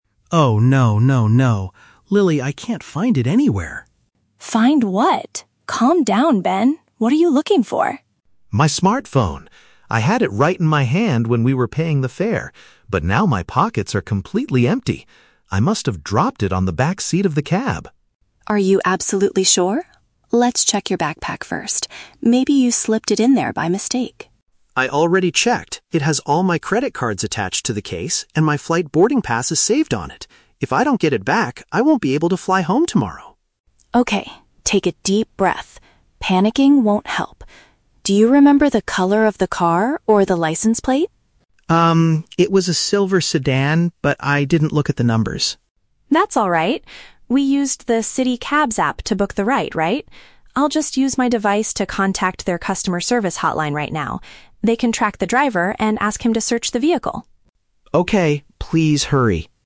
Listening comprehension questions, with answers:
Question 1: Why is the man especially worried about his missing item?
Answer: It contains his bank cards and digital travel documents.

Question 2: What is the woman's initial suggestion?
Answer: To look inside his luggage one more time just in case.

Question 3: How does the woman plan to resolve the situation at the end?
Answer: By reaching out to the company's helpline with her own phone.

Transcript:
Ben: Oh no... no, no, no. Lily, I can't find it anywhere!
Lily: Find what? Calm down, Ben. What are you looking for?
Ben: My smartphone. I had it right in my hand when we were paying the fare, but now my pockets are completely empty. I must have dropped it on the backseat of the cab!
Lily: Are you absolutely sure? Let's check your backpack first. Maybe you slipped it in there by mistake.
Ben: I already checked! It has all my credit cards attached to the case, and my flight boarding pass is saved on it. If I don't get it back, I won't be able to fly home tomorrow!
Lily: Okay, take a deep breath. Panicking won't help. Do you remember the color of the car or the license plate?
Ben: Um, it was a silver sedan, but I didn't look at the numbers.
We used the "City Cabs" app to book the ride, right? I'll just use my device to contact their customer service hotline right now.